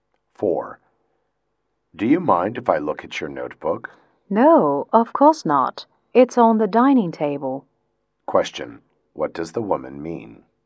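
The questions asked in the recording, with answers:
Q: What does the woman mean?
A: He can look at her notebook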